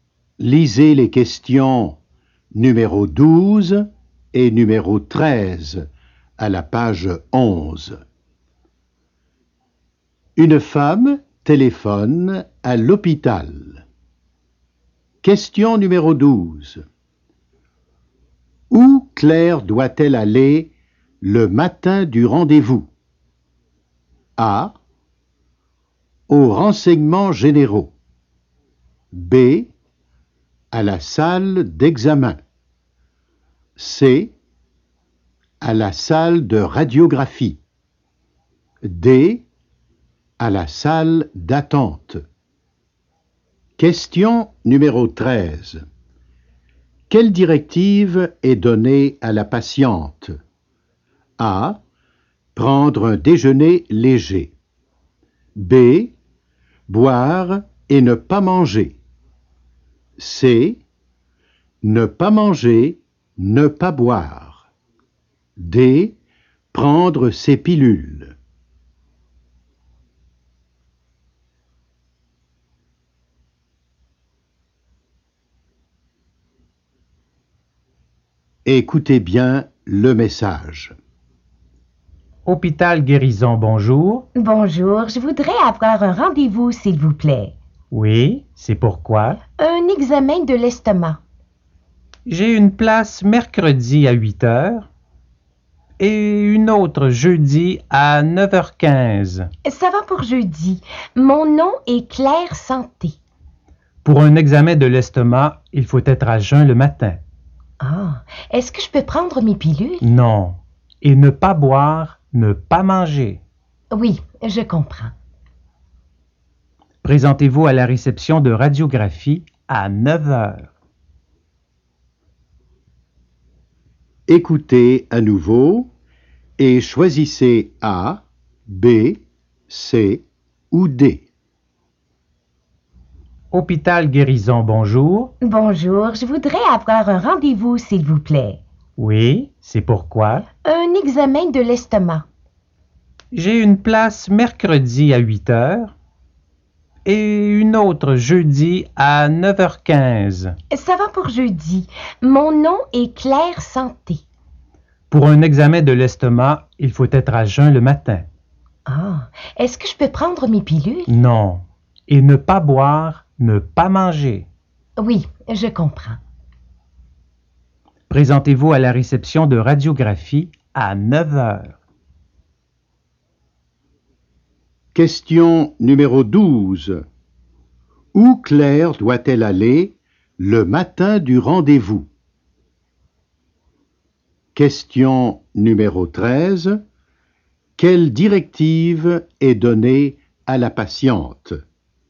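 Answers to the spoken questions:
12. C: À la salle de radiographie.
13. C: Ne pas manger, ne pas boire.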